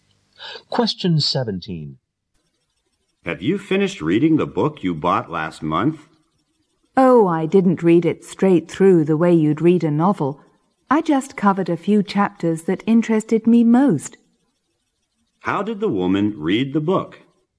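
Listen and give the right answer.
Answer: She read only the chapters that interested her most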